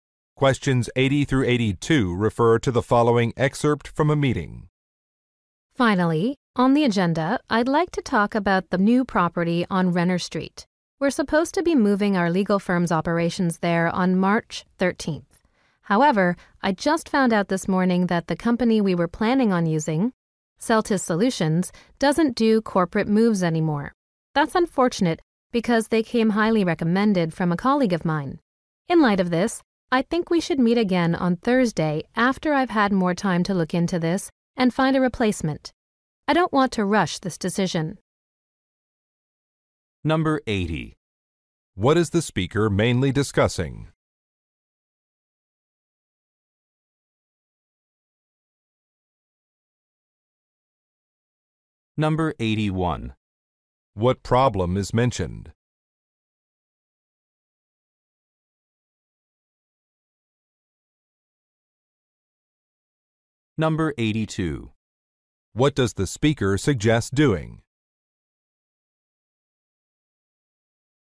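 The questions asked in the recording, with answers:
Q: What is the speaker mainly discussing?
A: Moving the firm to a new office

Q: What problem is mentioned?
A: The planned moving company no longer does corporate moves

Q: What does the speaker suggest doing?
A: Meeting again on Thursday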